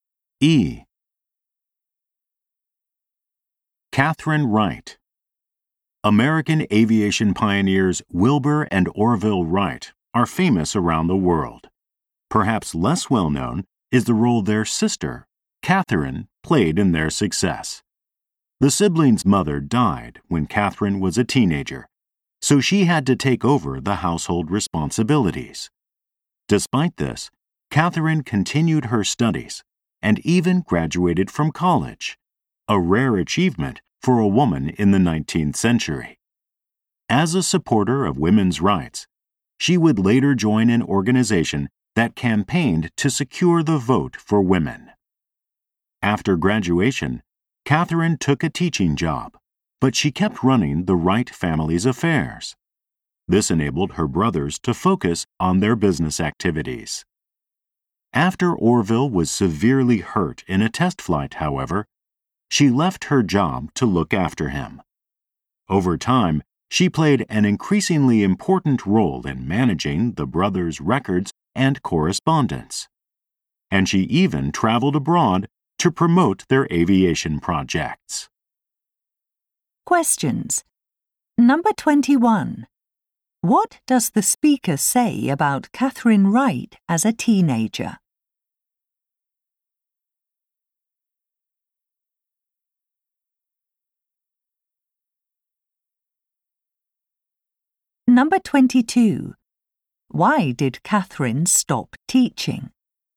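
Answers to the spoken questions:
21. She took over household responsibilities after her mother died
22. To look after Orville after he was badly hurt in a test flight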